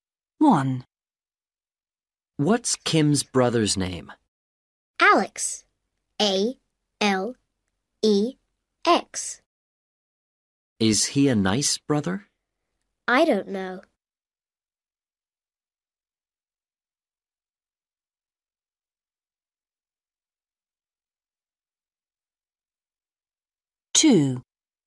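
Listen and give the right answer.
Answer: Alex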